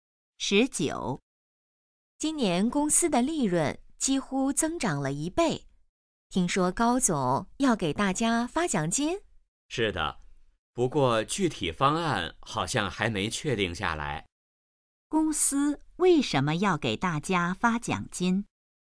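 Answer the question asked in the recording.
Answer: 公司利润增长了将近一倍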